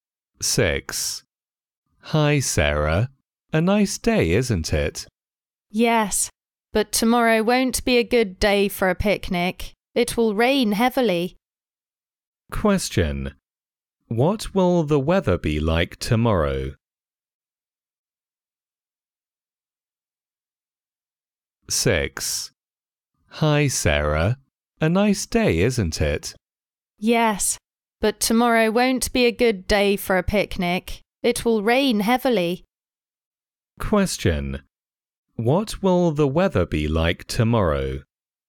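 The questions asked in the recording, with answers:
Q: What will the weather be like tomorrow?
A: Rainy (it will rain heavily)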